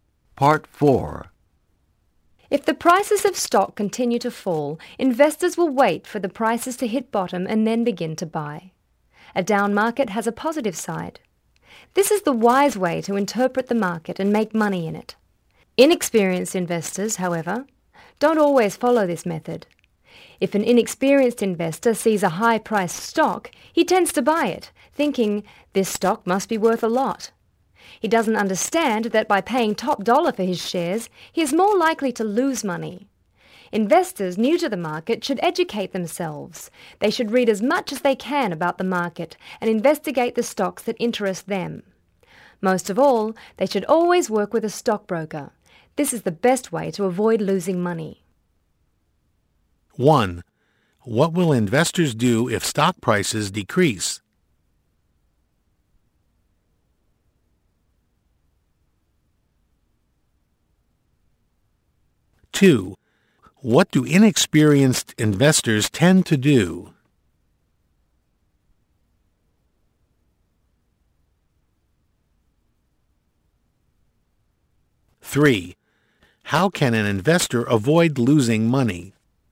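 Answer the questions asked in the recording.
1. Wait for prices to hit bottom and then buy
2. Buy high-priced stocks
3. Work with a stockbroker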